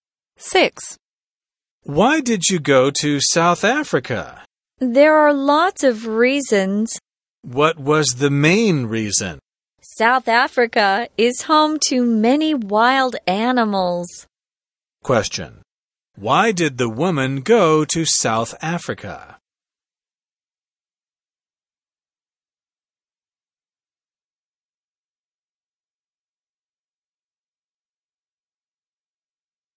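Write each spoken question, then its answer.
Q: Why did the woman go to South Africa?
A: To see its many wild animals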